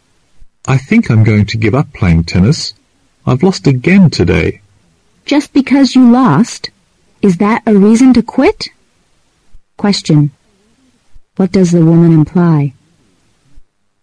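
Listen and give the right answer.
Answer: Losing a game is not a good reason to give up tennis.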